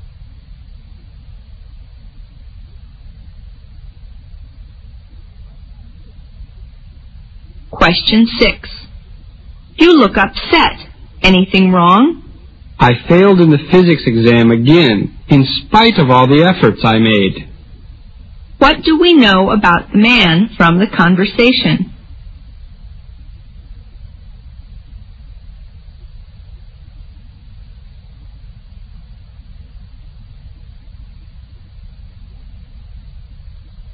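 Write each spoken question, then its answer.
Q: What do we know about the man from the conversation?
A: He failed the physics exam again despite his efforts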